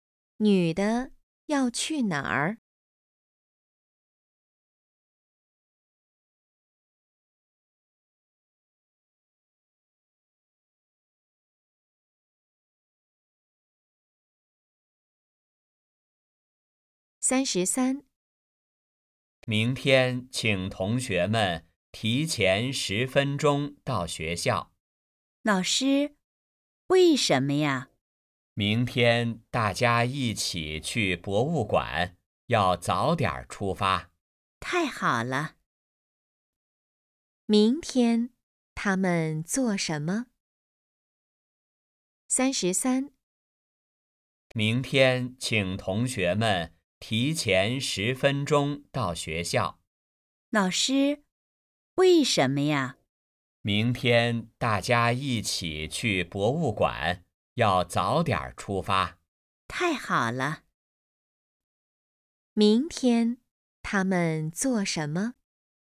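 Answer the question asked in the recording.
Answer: 去博物馆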